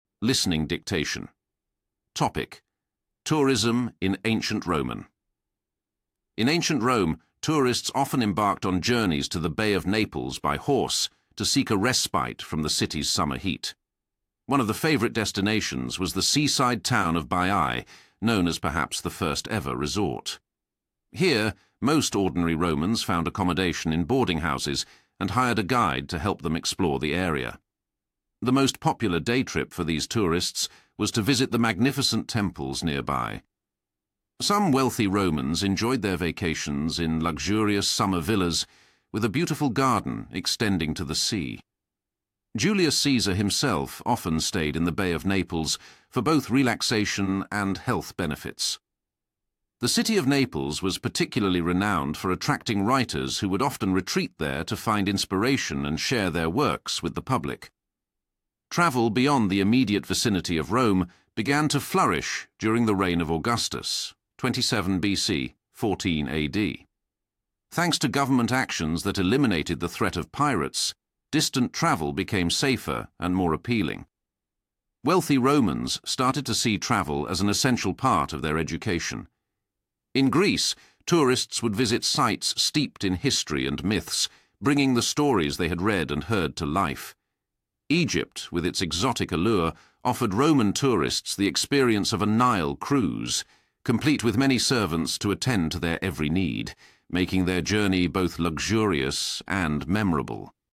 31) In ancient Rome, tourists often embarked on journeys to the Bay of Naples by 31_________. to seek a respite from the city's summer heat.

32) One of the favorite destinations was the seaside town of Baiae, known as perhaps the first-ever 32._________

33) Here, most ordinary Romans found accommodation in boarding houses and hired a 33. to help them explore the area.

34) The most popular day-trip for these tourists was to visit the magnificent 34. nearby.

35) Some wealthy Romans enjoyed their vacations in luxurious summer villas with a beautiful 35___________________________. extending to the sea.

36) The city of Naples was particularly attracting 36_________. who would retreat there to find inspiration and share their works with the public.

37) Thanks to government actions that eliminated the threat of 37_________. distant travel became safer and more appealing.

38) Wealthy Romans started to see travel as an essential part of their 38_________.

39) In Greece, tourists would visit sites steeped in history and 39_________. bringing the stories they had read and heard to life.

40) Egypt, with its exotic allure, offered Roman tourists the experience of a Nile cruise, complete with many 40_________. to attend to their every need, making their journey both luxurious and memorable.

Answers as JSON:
{"31": "horse", "32": "resort", "33": "guide", "34": "temples", "35": "garden", "36": "writers", "37": "pirates", "38": "education", "39": "myths", "40": "servants"}